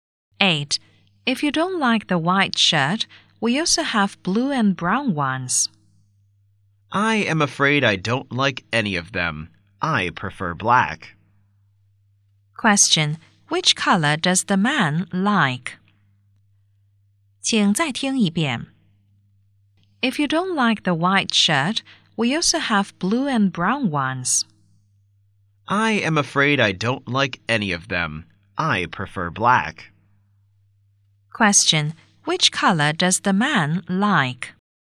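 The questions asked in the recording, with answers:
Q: Which color does the man like?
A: Black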